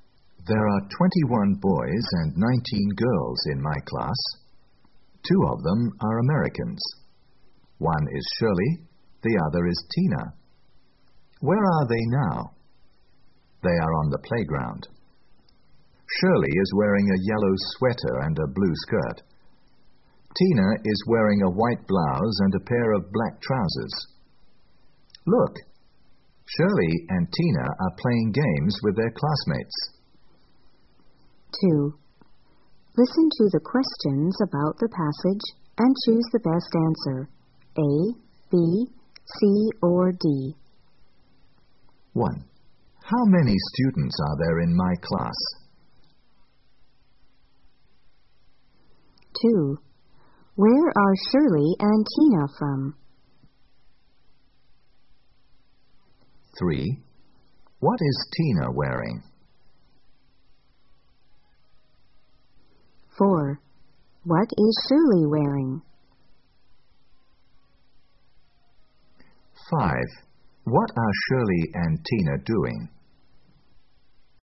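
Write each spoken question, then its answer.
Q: How many students are there in my class?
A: 40

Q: Where are Shirley and Tina from?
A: America

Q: What is Tina wearing?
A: A white blouse and a pair of black trousers

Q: What is Shirley wearing?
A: A yellow sweater and a blue skirt

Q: What are Shirley and Tina doing?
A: Playing games with their classmates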